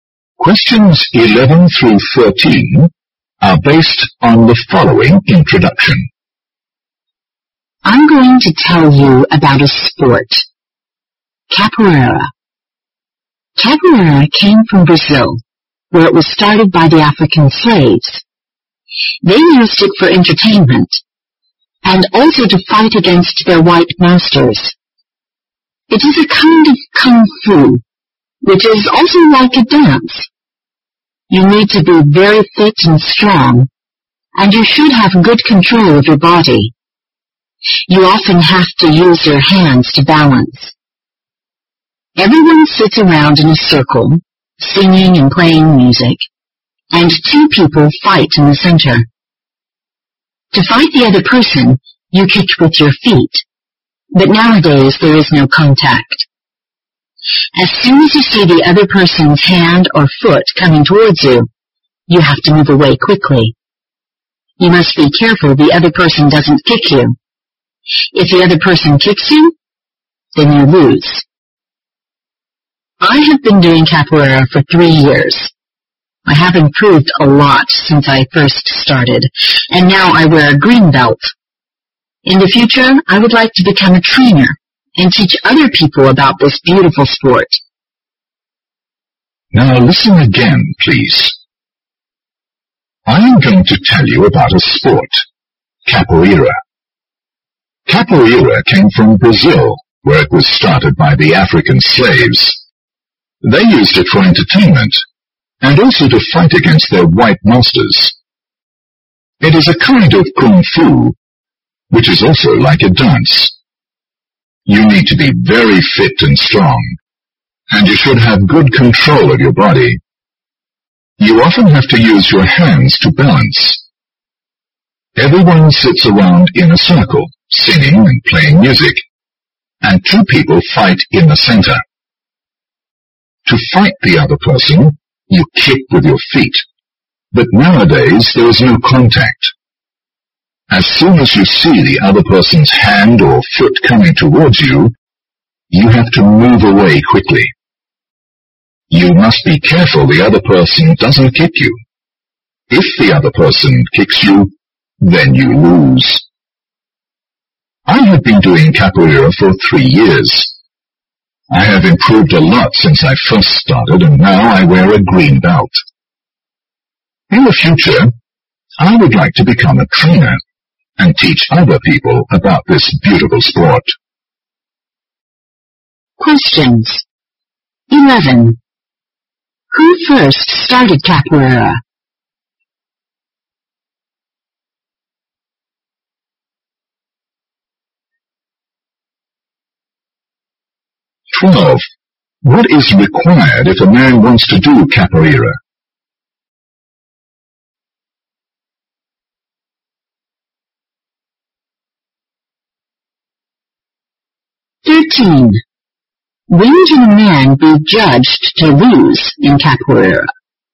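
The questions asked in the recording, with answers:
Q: Who first started capoeira?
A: African slaves in Brazil

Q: What is required if a man wants to do capoeira?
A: Being very fit and strong, with good control of the body

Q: When can a man be judged to lose in capoeira?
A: When the other person kicks him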